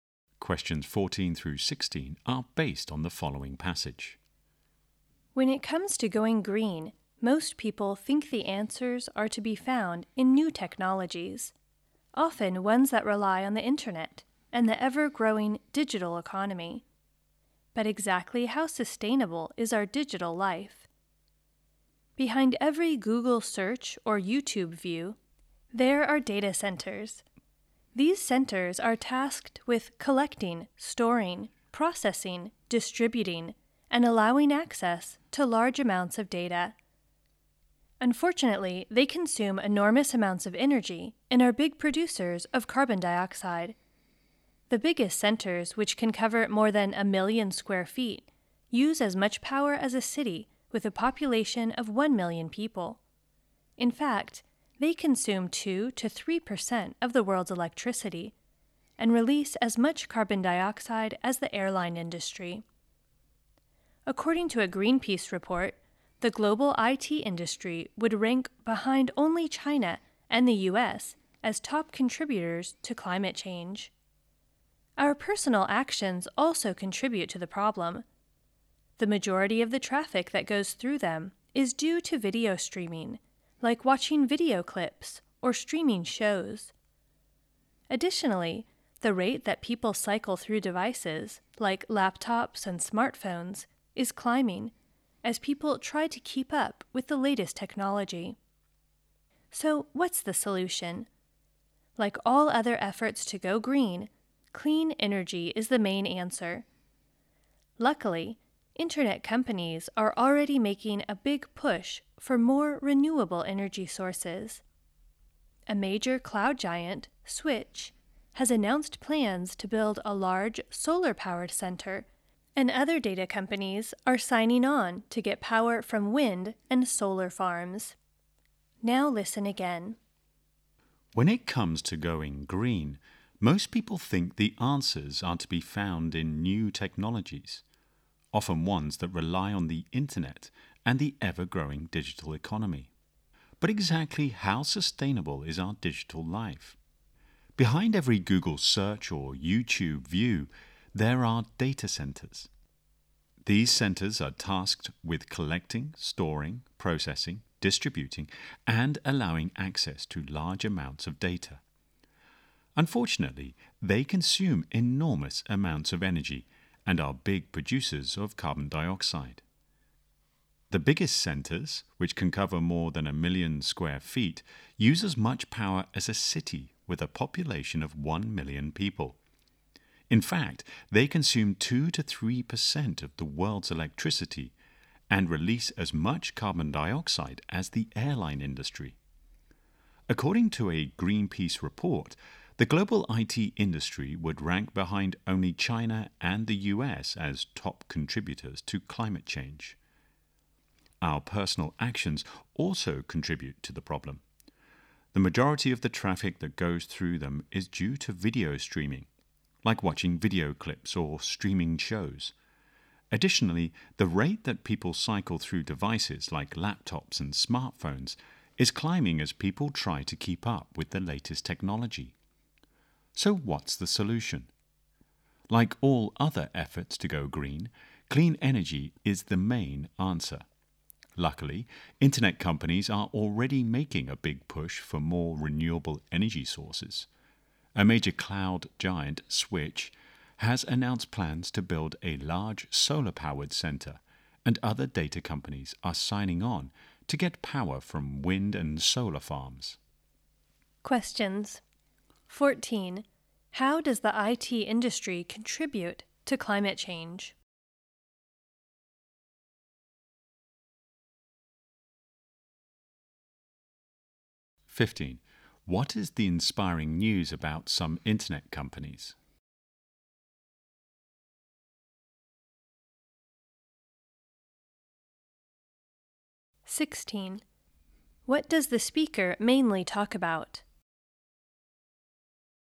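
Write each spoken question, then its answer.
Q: How does the IT industry contribute to climate change?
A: Its data centers use huge amounts of energy and produce carbon dioxide

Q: What is the inspiring news about some internet companies?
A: They are switching to renewable energy like solar and wind

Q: What does the speaker mainly talk about?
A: The environmental impact of our digital life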